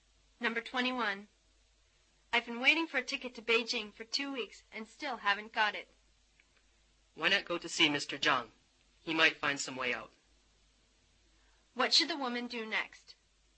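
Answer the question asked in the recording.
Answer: Go to see Mr. Zhang.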